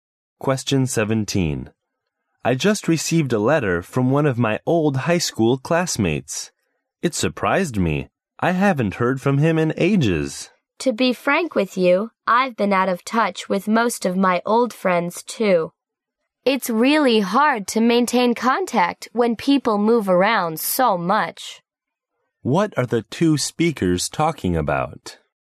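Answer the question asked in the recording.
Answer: Keeping in touch with old friends.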